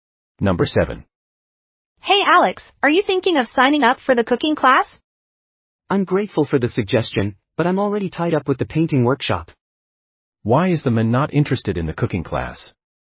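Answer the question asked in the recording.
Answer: He is already busy with the painting workshop.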